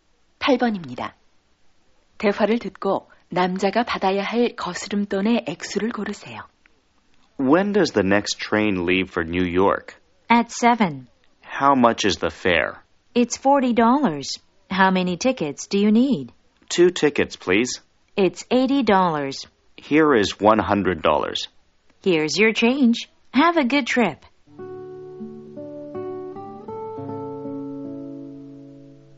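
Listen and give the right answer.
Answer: 20달러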